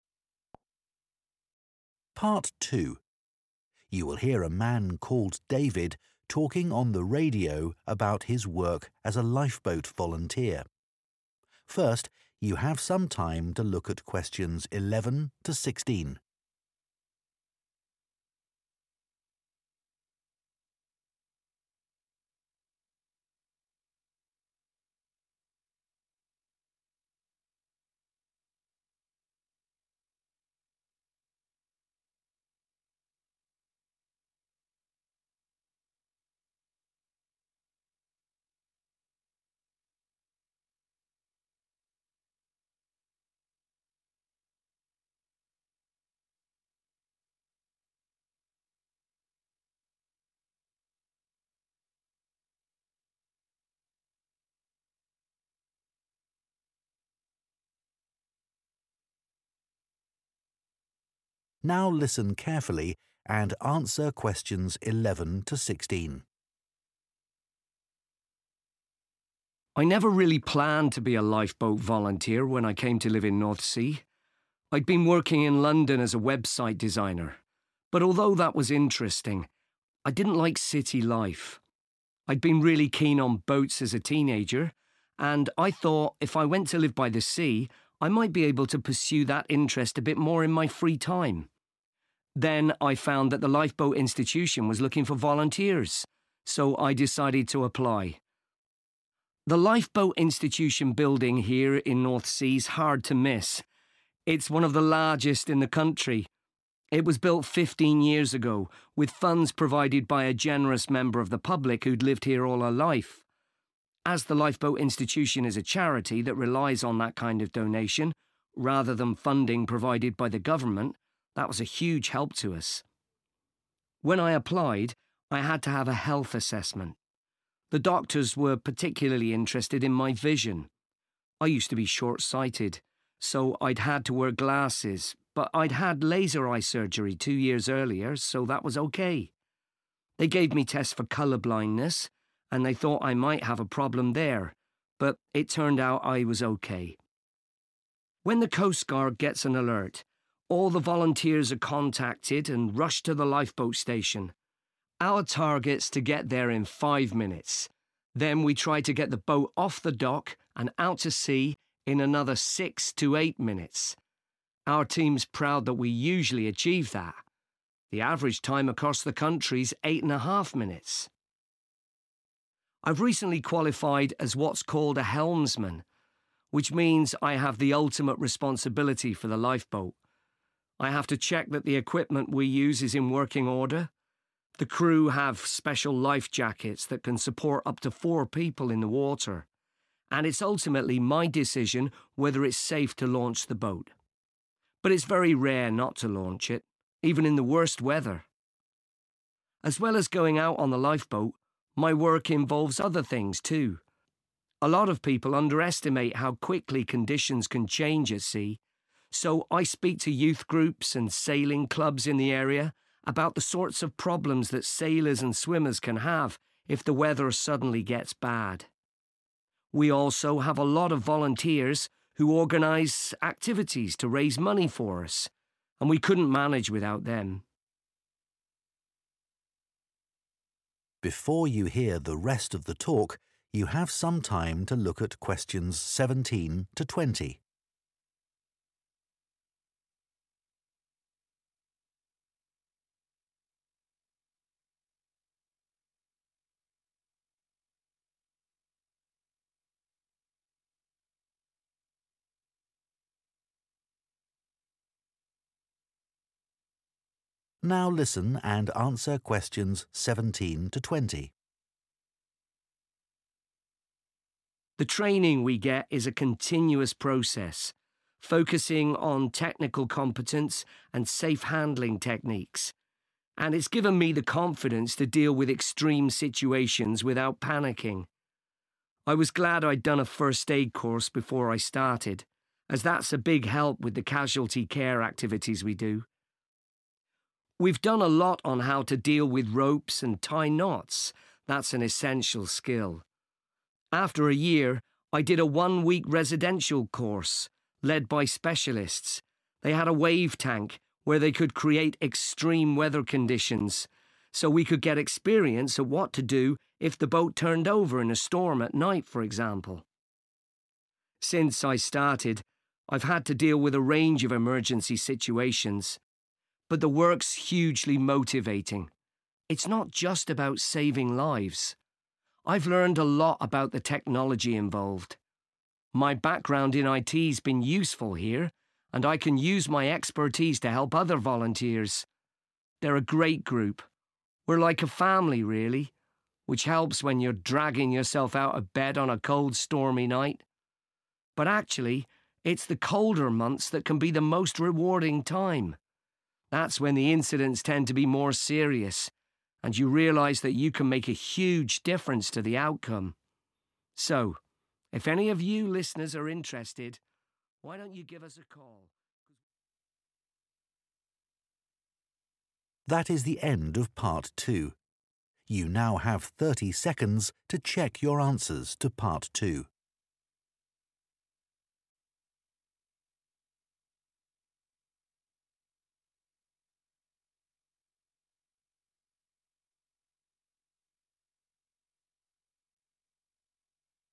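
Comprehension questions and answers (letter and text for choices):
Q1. What made David leave London and move to Northsea?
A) He was eager to develop a hobby.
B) He wanted to work shorter hours.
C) He found his job in website design unsatisfying.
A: A) He was eager to develop a hobby.

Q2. The Lifeboat Institution in Northsea was built with money provided by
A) a local organisation.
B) a local resident.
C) the local council.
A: B) a local resident.

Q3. In his health assessment, the doctor was concerned about the fact that David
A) might be colour blind.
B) was rather short-sighted.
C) had undergone eye surgery.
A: A) might be colour blind.

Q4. After arriving at the lifeboat station, they aim to launch the boat within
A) five minutes.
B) six to eight minutes.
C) eight and a half minutes.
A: B) six to eight minutes.

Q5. As a 'helmsman', David has the responsibility of deciding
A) who will be the members of his crew.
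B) what equipment it will be necessary to take.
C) if the lifeboat should be launched.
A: C) if the lifeboat should be launched.

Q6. As well as going out on the lifeboat, David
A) gives talks on safety at sea.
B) helps with fundraising.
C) recruits new volunteers.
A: A) gives talks on safety at sea.

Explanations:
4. Then we try to get the boat off the dock and out to sea in another 6 to 8 minutes. [Sau đó chúng tôi cố gắng đưa thuyền rời bến và ra khơi trong 6 đến 8 phút nữa.]
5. and it's ultimately my decision whether it's safe to launch the boat. [Thủy thủ đoàn có áo phao đặc biệt có thể hỗ trợ tối đa 4 người dưới nước và cuối cùng tôi là người quyết định liệu việc hạ thủy thuyền có an toàn hay không.]
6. so I speak to youth groups and sailing clubs in the area about the sorts of problems that sailors and swimmers can have if the weather suddenly gets bad. [vì vậy tôi nói chuyện với các nhóm thanh niên và câu lạc bộ chèo thuyền trong khu vực về những vấn đề mà các thủy thủ và người bơi lội có thể gặp phải nếu thời tiết xấu đột ngột.]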